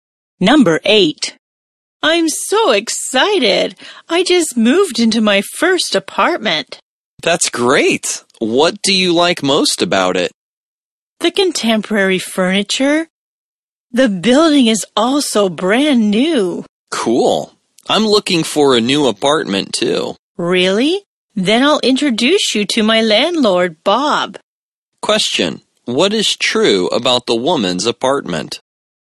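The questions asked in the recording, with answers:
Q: What is true about the woman's apartment?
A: It has contemporary furniture and is in a brand-new building.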